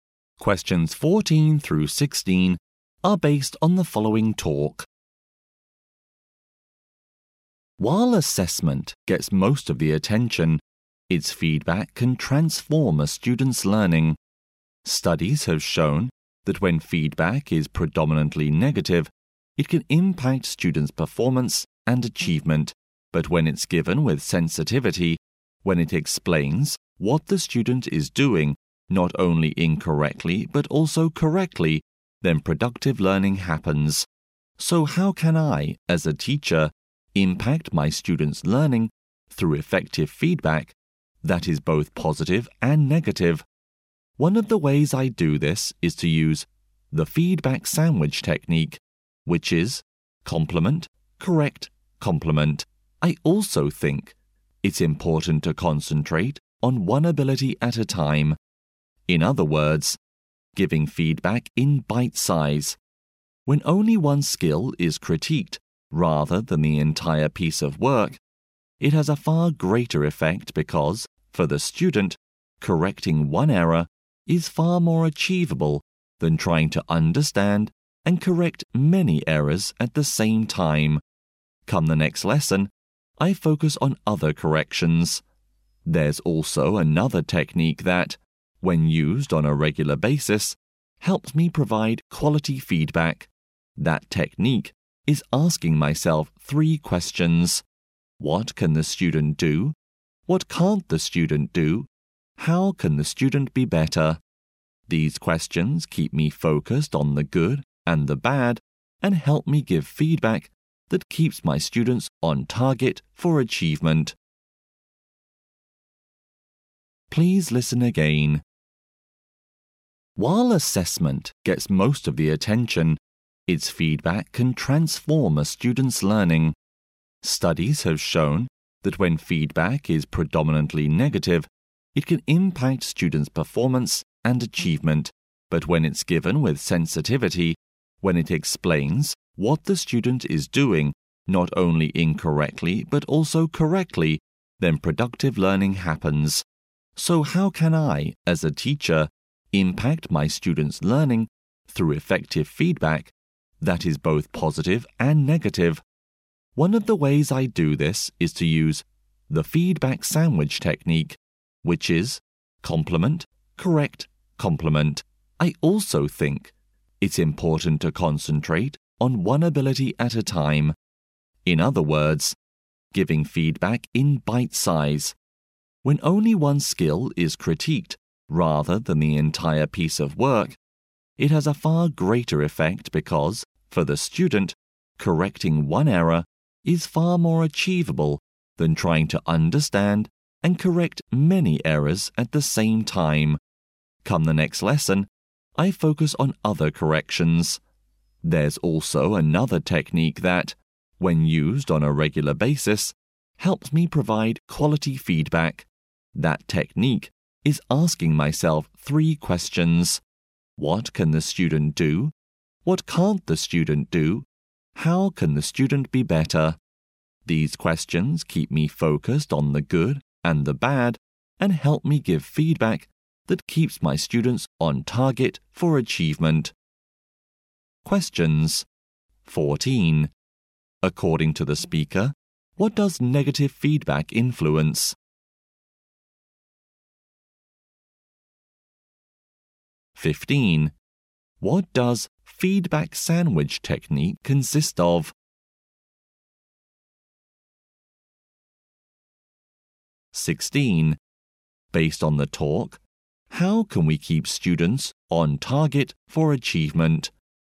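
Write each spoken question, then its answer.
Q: According to the speaker, what does negative feedback influence?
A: Students' performance and achievement

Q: What does feedback sandwich technique consist of?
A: Compliment, correct, compliment

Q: Based on the talk, how can we keep students on target for achievement?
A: By giving feedback that focuses on both the good and the bad, using three questions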